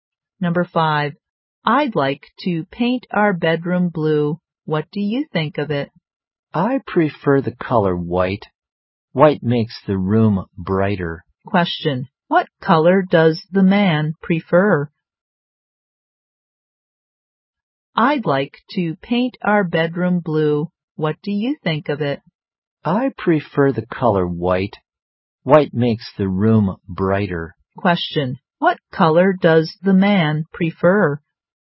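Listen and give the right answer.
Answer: White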